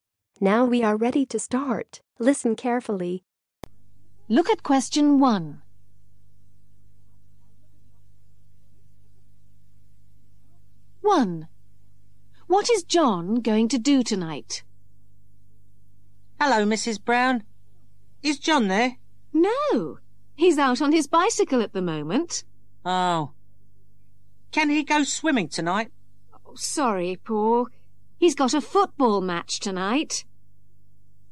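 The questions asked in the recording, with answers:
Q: What is John going to do tonight?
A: Play in a football match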